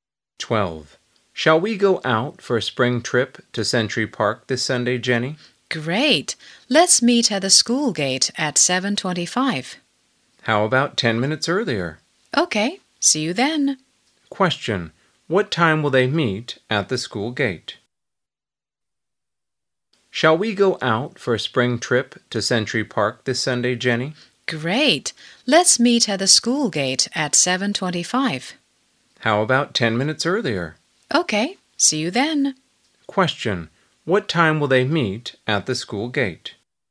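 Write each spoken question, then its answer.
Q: What time will they meet at the school gate?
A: At 7:15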